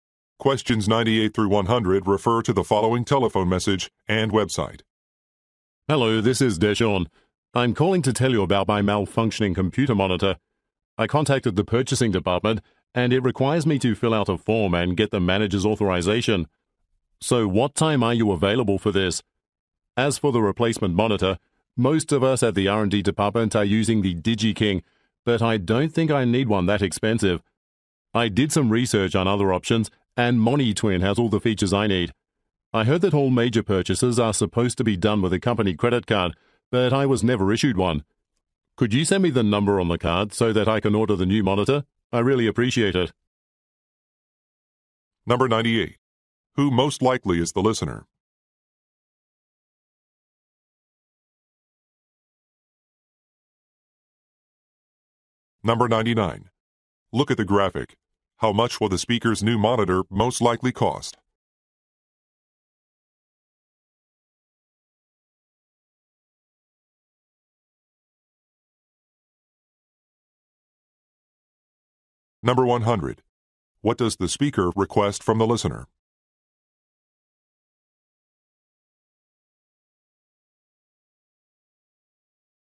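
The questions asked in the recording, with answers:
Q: What does the speaker request from the listener?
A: The company credit card number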